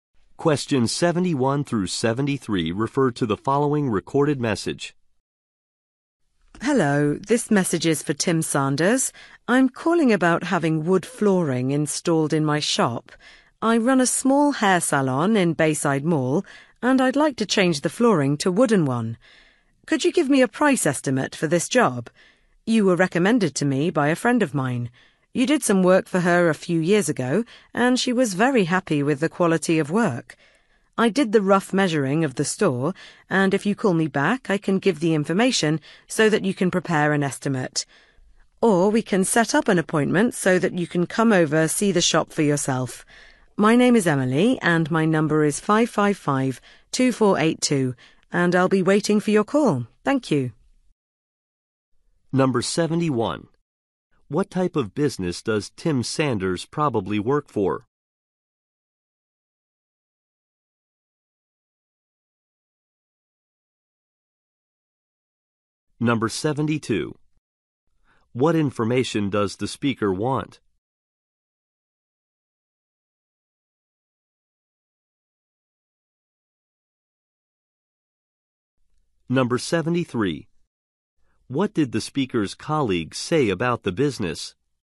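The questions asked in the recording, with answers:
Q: What type of business does Tim Sanders probably work for?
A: Flooring installation

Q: What information does the speaker want?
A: A price estimate

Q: What did the speaker's colleague say about the business?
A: She was very happy with the quality of work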